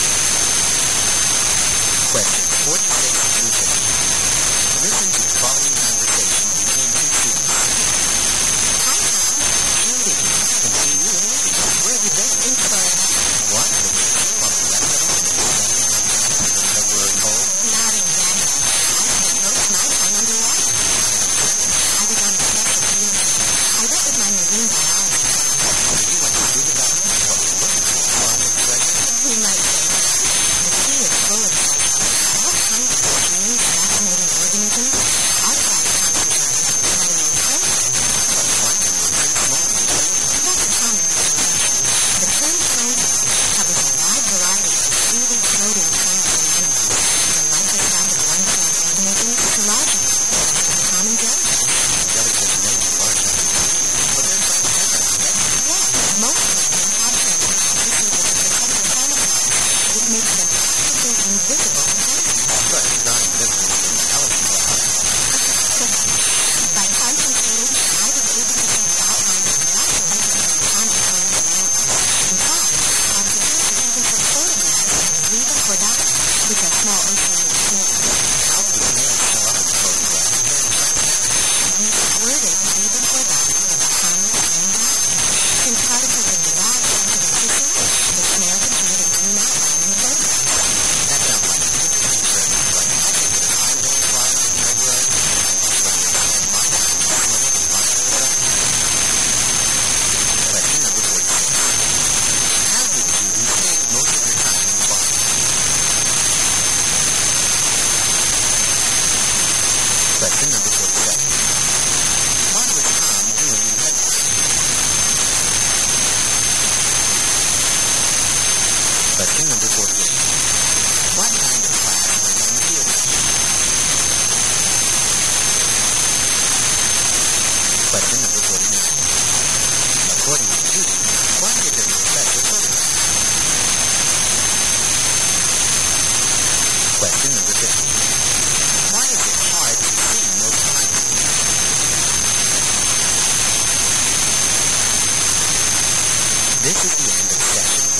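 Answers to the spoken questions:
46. Underwater on a field trip
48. Marine biology
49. Small oceanic snails
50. Their tissues are transparent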